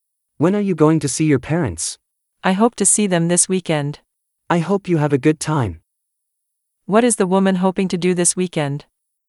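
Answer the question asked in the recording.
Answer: See her parents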